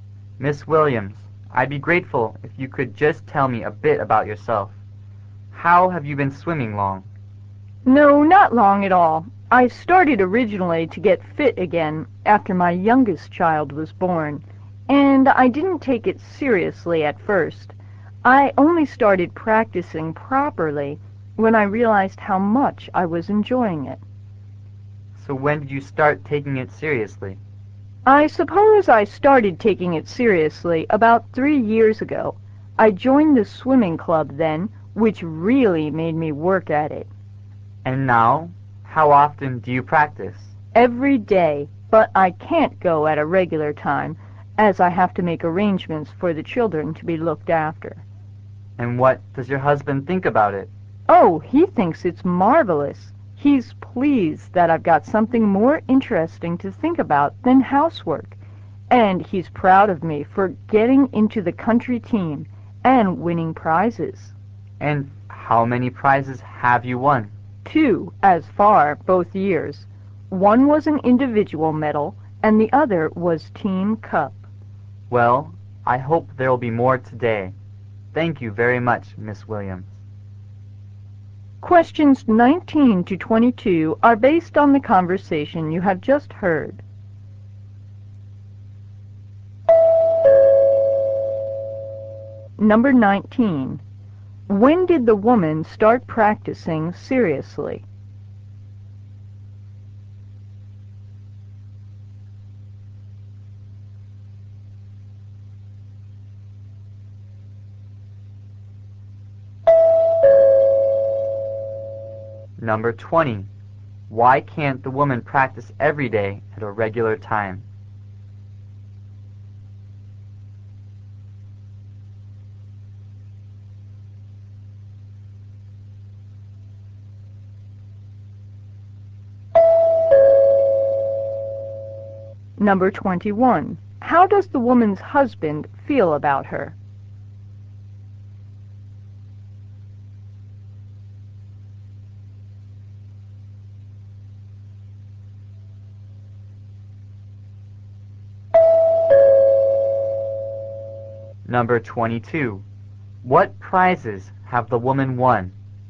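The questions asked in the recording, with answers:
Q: When did the woman start practicing seriously?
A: About 3 years ago

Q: Why can't the woman practice every day at a regular time?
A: She has to arrange for her children to be looked after

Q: How does the woman's husband feel about her?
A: He is pleased and proud of her

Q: What prizes have the woman won?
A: An individual medal and a team cup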